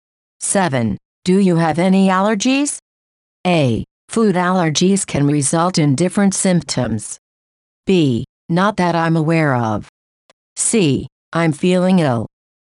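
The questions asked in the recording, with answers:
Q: Do you have any allergies?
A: B: Not that I'm aware of.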